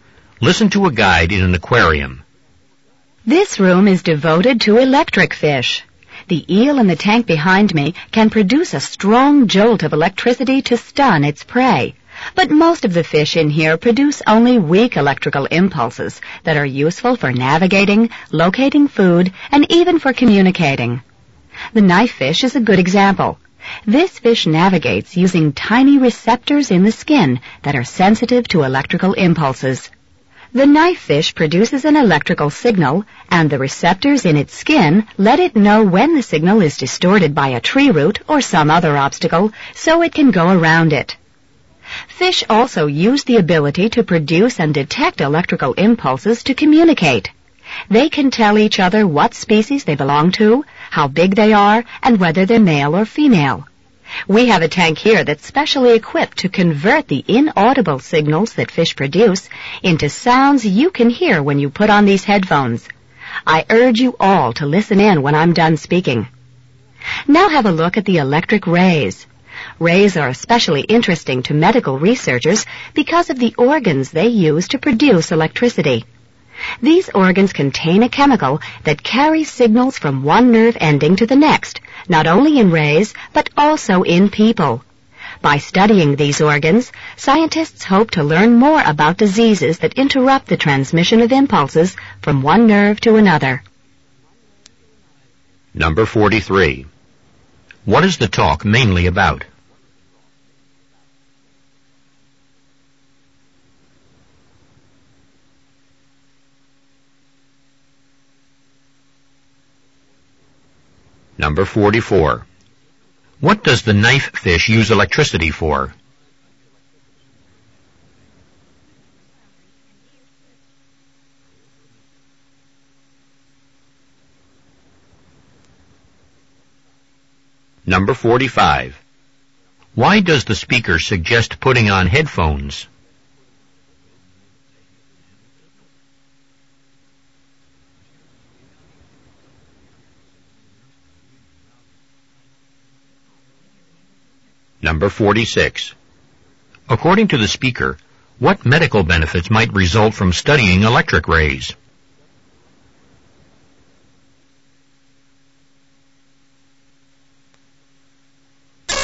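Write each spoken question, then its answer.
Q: What is the talk mainly about?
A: Electric fish and how they use electricity

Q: What does the knife fish use electricity for?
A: To navigate around obstacles

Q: Why does the speaker suggest putting on headphones?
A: To hear fish signals converted into sounds

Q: According to the speaker, what medical benefits might result from studying electric rays?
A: Learning more about diseases that interrupt nerve impulse transmission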